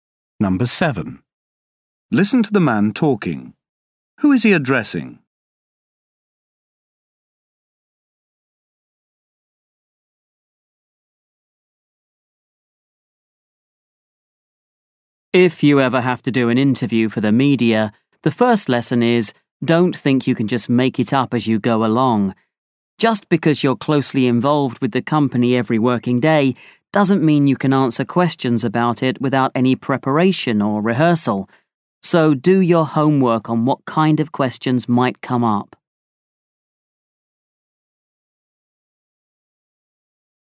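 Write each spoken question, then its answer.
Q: Who is he addressing?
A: Company employees who may be interviewed by the media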